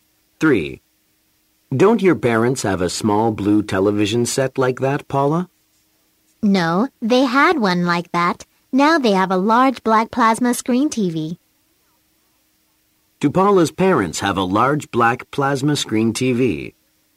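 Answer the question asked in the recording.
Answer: Yes, they do.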